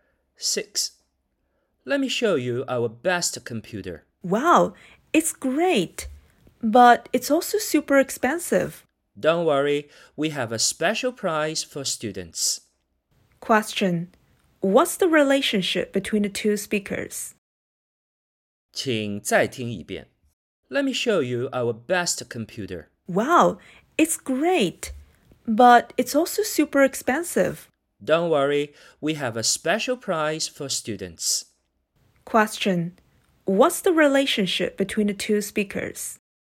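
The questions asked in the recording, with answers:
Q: What's the relationship between the two speakers?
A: Salesperson and customer (a student)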